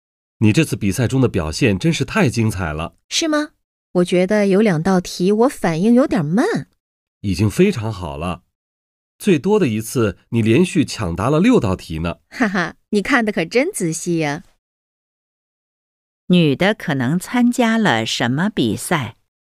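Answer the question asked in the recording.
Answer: 抢答比赛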